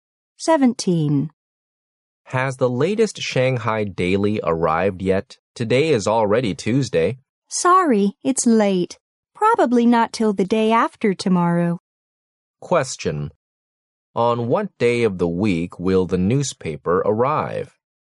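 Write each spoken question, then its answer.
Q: On what day of the week will the newspaper arrive?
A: Thursday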